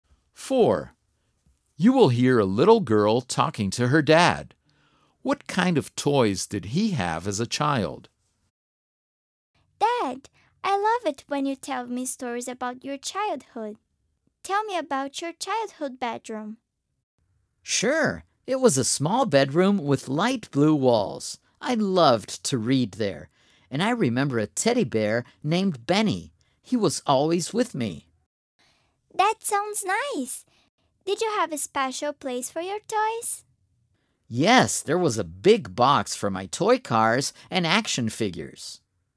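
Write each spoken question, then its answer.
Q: What kind of toys did he have as a child?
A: Toy cars and action figures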